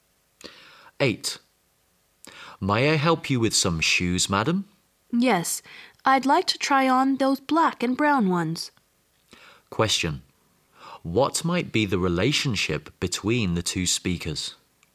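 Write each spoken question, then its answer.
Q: What might be the relationship between the two speakers?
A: Shop assistant and customer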